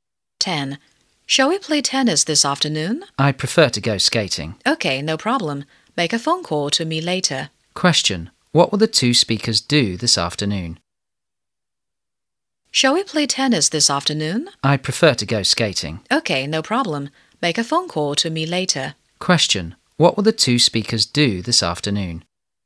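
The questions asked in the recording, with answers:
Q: What will the two speakers do this afternoon?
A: Go skating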